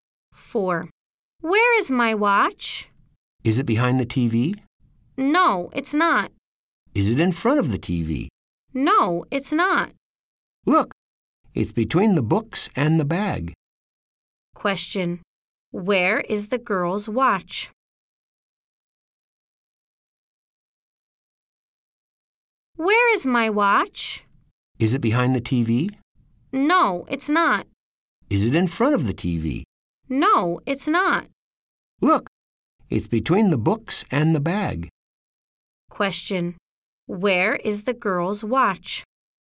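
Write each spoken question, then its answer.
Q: Where is the girl's watch?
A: Between the books and the bag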